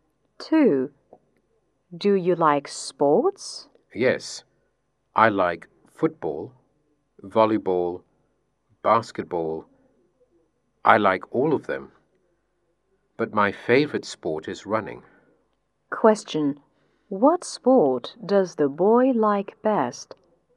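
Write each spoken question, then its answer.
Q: What sport does the boy like best?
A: Running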